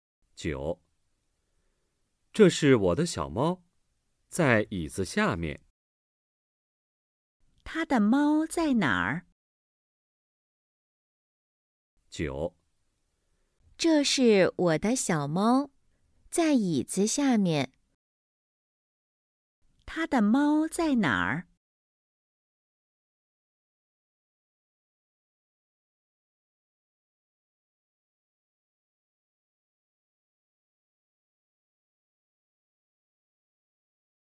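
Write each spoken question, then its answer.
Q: 他的猫在哪儿?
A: 在椅子下面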